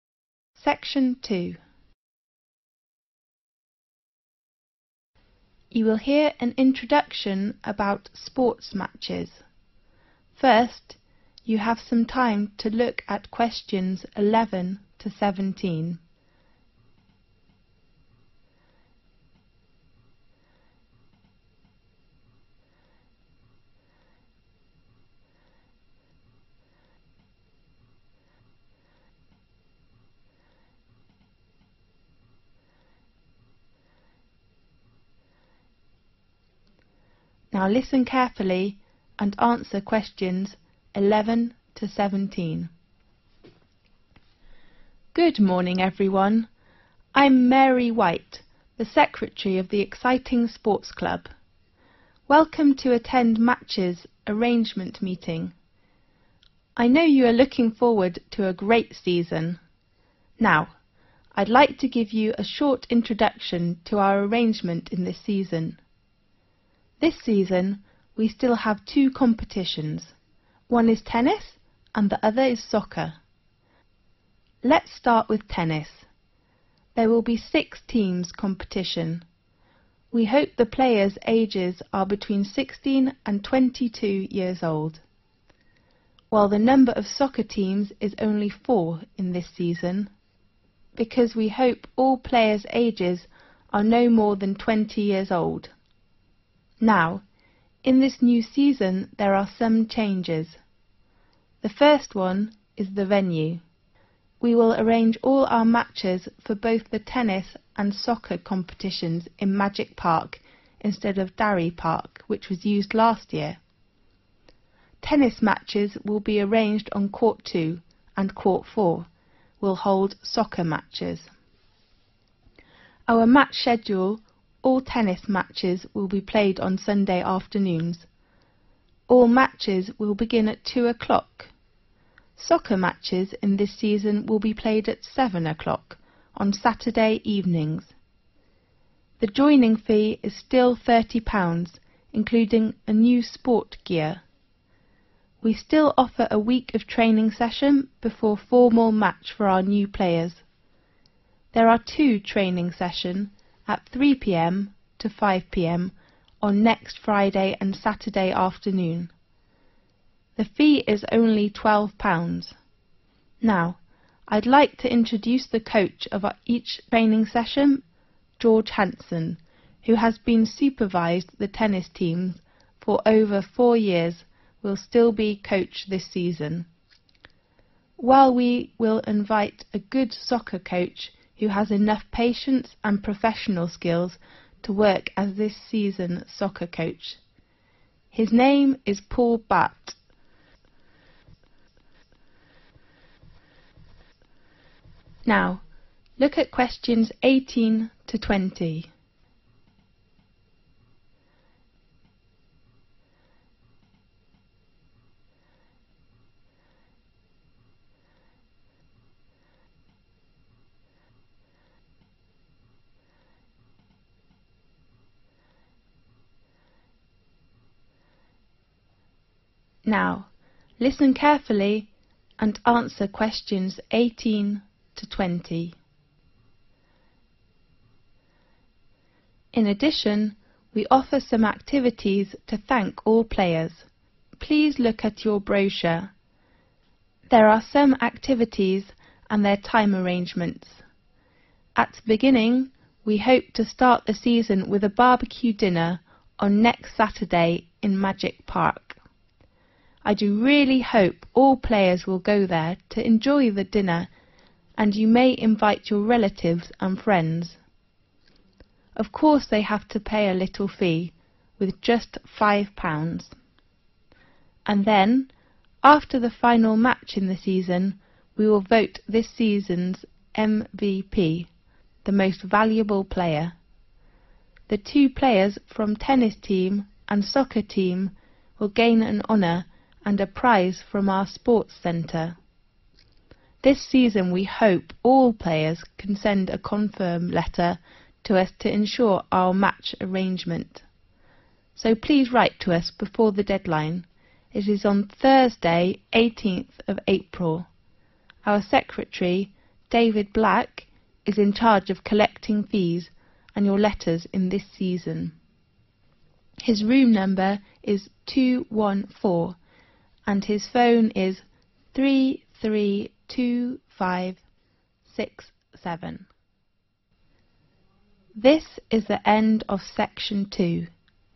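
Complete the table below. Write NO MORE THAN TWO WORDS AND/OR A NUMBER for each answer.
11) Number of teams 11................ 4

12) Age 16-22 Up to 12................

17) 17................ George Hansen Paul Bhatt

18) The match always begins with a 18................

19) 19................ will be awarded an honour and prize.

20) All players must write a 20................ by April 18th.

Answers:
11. 6
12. 20
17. Coach
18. barbecue dinner
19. MVP
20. confirm letter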